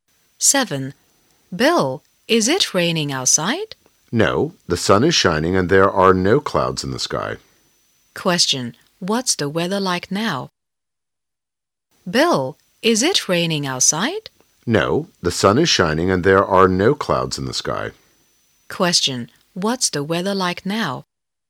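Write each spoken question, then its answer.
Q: Question, what's the weather like now?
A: It's sunny.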